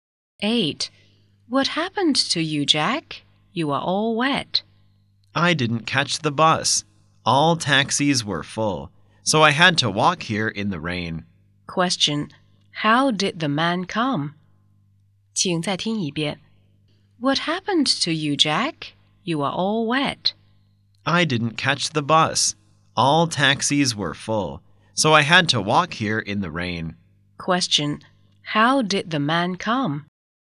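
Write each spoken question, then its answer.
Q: How did the man come?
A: On foot (he walked in the rain)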